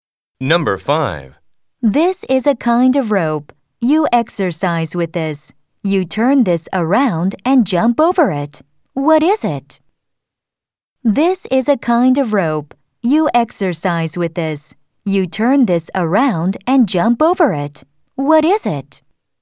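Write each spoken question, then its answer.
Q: What is it?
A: a jump rope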